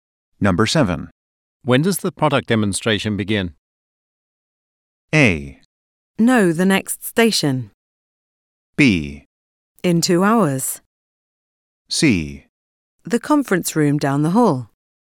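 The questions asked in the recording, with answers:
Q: When does the product demonstration begin?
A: B: In 2 hours.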